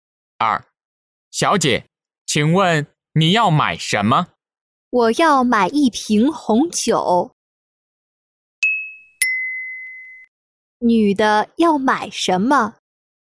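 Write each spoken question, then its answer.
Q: 女的要买什么?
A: 一瓶红酒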